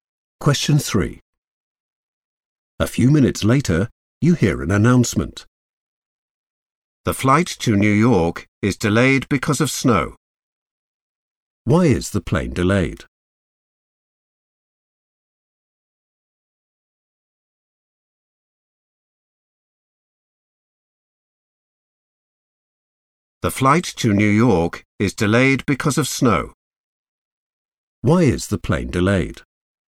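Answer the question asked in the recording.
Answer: because of snow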